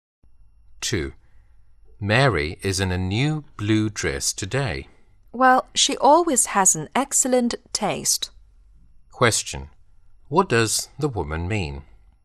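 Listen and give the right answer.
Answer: Mary always dresses with excellent taste.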